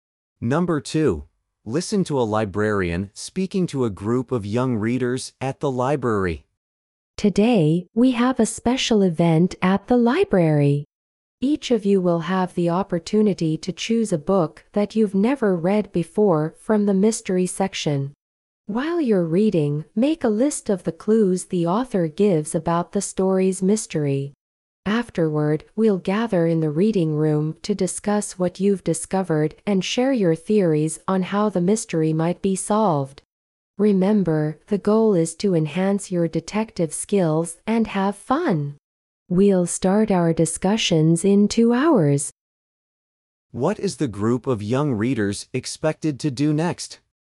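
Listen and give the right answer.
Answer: Choose a new mystery book and list the author's clues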